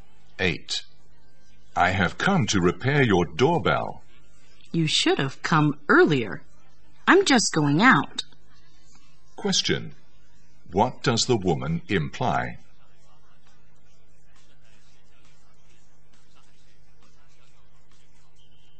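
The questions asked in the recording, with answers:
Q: What does the woman imply?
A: The repairman came too late; she can't have the doorbell repaired now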